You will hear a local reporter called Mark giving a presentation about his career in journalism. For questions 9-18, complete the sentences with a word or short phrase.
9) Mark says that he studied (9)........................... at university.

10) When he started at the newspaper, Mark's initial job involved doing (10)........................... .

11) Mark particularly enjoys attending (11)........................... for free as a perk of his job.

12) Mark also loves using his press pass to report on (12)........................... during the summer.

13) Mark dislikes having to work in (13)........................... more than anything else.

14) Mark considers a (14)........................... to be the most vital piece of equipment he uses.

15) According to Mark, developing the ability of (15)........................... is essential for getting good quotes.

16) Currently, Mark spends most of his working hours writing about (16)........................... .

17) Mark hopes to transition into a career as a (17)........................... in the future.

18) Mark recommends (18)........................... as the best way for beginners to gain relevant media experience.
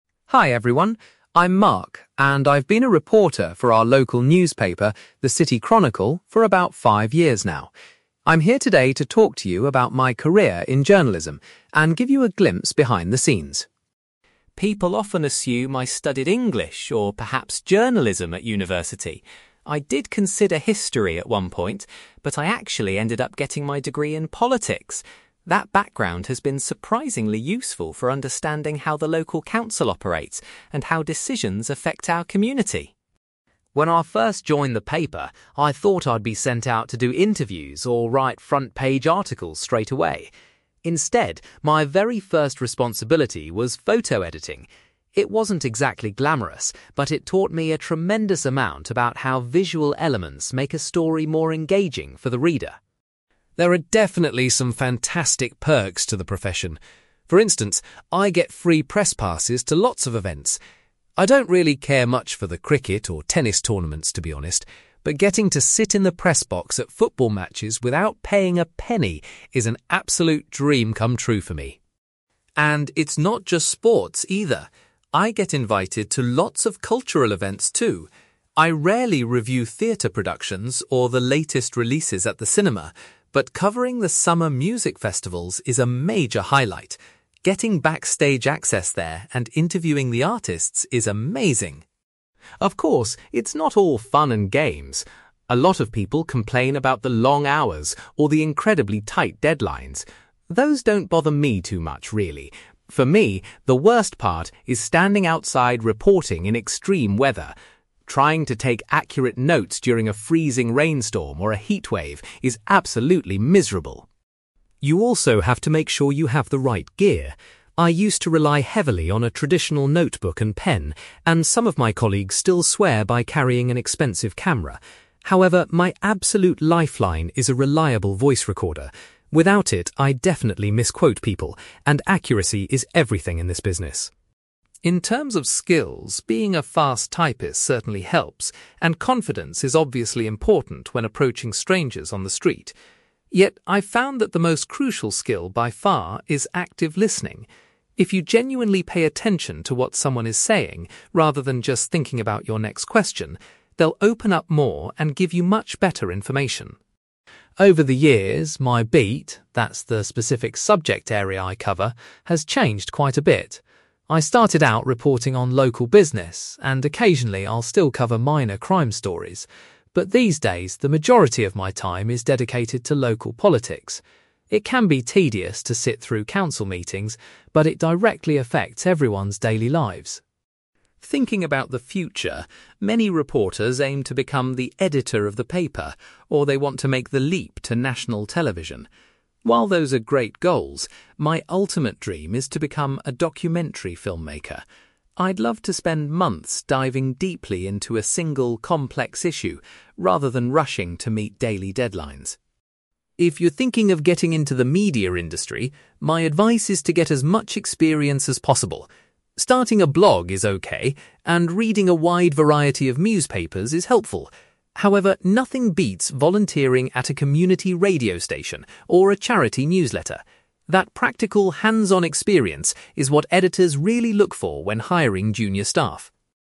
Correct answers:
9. politics
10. photo editing
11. football matches
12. music festivals
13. extreme weather
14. voice recorder
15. active listening
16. local politics
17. documentary filmmaker
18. volunteering

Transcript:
Mark: Hi everyone, I'm Mark, and I've been a reporter for our local newspaper, the City Chronicle, for about five years now. I'm here today to talk to you about my career in journalism and give you a glimpse behind the scenes.
People often assume I studied English or perhaps Journalism at university. I did consider History at one point, but I actually ended up getting my degree in politics. That background has been surprisingly useful for understanding how the local council operates and how decisions affect our community!
When I first joined the paper, I thought I'd be sent out to do interviews or write front-page articles straight away. Instead, my very first responsibility was photo editing. It wasn't exactly glamorous, but it taught me a tremendous amount about how visual elements make a story more engaging for the reader.
There are definitely some fantastic perks to the profession. For instance, I get free press passes to lots of events. I don't really care much for the cricket or tennis tournaments, to be honest. But getting to sit in the press box at football matches without paying a penny is an absolute dream come true for me.
And it's not just sports, either. I get invited to lots of cultural events, too. I rarely review theatre productions or the latest releases at the cinema, but covering the summer music festivals is a major highlight. Getting backstage access there and interviewing the artists is amazing.
Of course, it's not all fun and games. A lot of people complain about the long hours or the incredibly tight deadlines. Those don't bother me too much, really. For me, the worst part is standing outside reporting in extreme weather. Trying to take accurate notes during a freezing rainstorm or a heatwave is absolutely miserable!
You also have to make sure you have the right gear. I used to rely heavily on a traditional notebook and pen, and some of my colleagues still swear by carrying an expensive camera. However, my absolute lifeline is a reliable voice recorder. Without it, I'd definitely misquote people, and accuracy is everything in this business.
In terms of skills, being a fast typist certainly helps, and confidence is obviously important when approaching strangers on the street. Yet, I've found that the most crucial skill by far is active listening. If you genuinely pay attention to what someone is saying, rather than just thinking about your next question, they'll open up more and give you much better information.
Over the years, my beat—that's the specific subject area I cover—has changed quite a bit. I started out reporting on local business, and occasionally I'll still cover minor crime stories. But these days, the majority of my time is dedicated to local politics. It can be tedious to sit through council meetings, but it directly affects everyone's daily lives.
Thinking about the future, many reporters aim to become the editor of the paper, or they want to make the leap to national television. While those are great goals, my ultimate dream is to become a documentary filmmaker. I'd love to spend months diving deeply into a single, complex issue rather than rushing to meet daily deadlines.
If you're thinking of getting into the media industry, my advice is to get as much experience as possible. Starting a blog is okay, and reading a wide variety of newspapers is helpful. However, nothing beats volunteering at a community radio station or a charity newsletter. That practical, hands-on experience is what editors really look for when hiring junior staff.

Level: B2